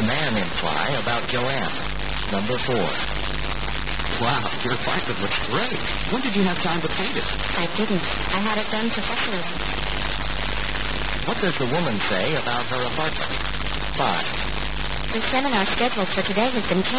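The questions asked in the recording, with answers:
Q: What does the woman say about her apartment?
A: She had it painted professionally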